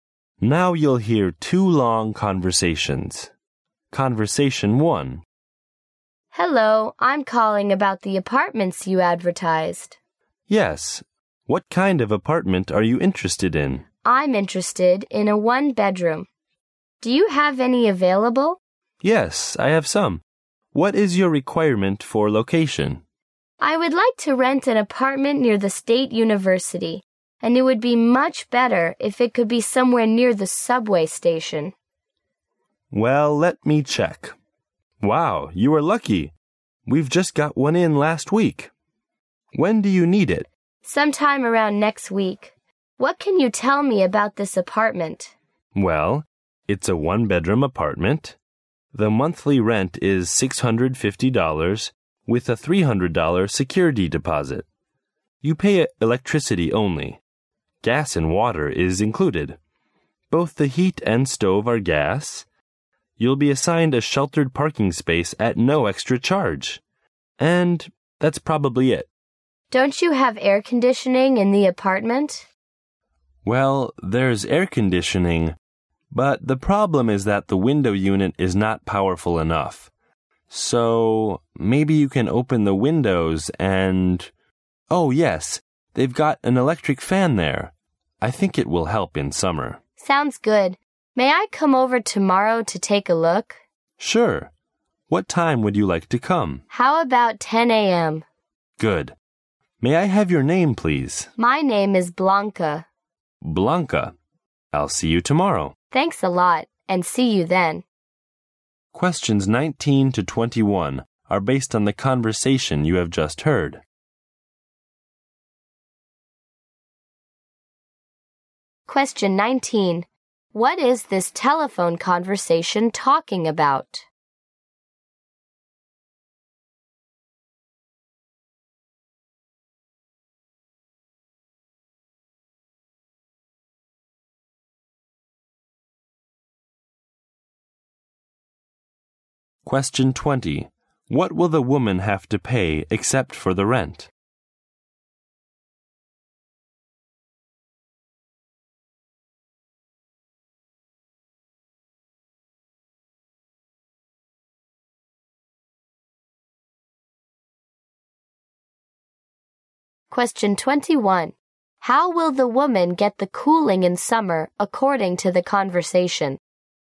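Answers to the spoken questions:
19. Renting an apartment
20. Electricity, plus a $300 security deposit
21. From an electric fan, since the air conditioner is weak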